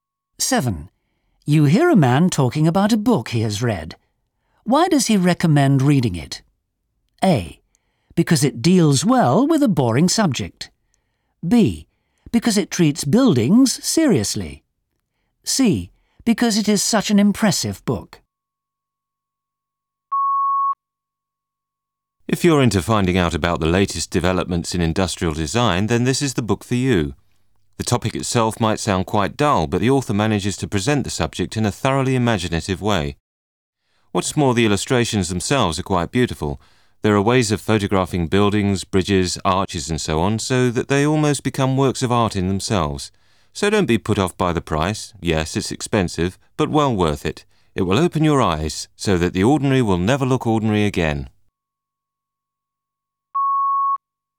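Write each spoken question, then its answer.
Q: Why does he recommend reading it?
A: A: Because it deals well with a boring subject.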